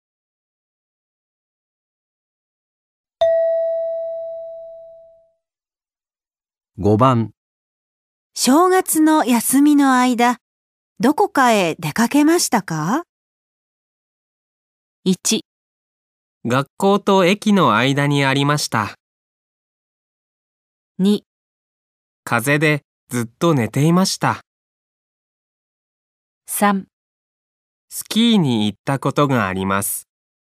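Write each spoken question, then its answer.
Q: 正月の休みの間、どこかへ出かけましたか?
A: 2: 風邪でずっと寝ていました。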